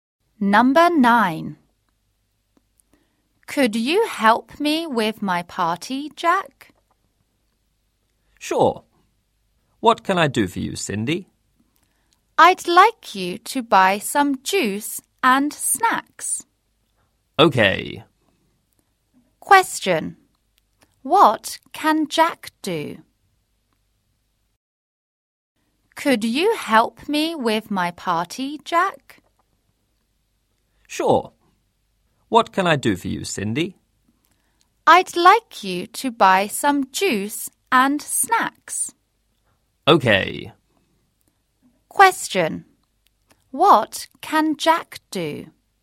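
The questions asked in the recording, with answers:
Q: What can Jack do?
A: Buy some juice and snacks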